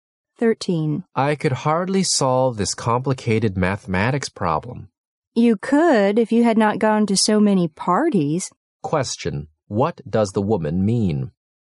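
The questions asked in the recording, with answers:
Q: what does the woman mean?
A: He could solve it if he hadn't gone to so many parties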